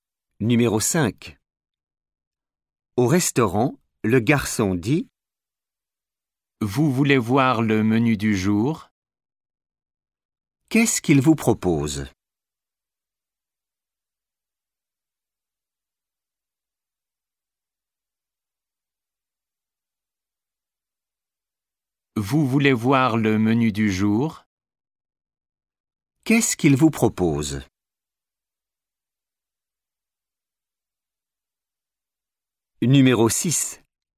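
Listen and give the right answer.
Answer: Le menu du jour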